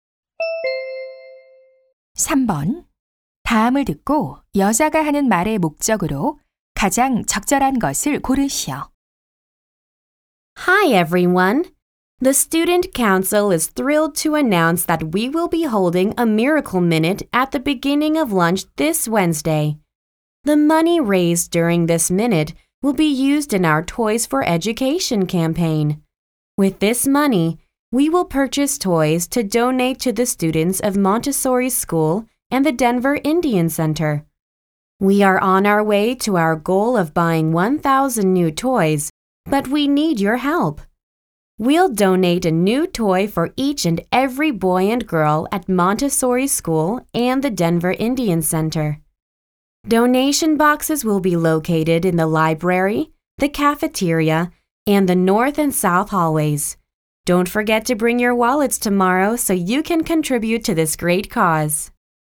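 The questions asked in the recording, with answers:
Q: 다음을 듣고 여자가 하는 말의 목적으로 가장 적절한 것을 고르시오.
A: 장난감 기부 캠페인을 위한 모금 행사(Miracle Minute) 참여를 독려하려고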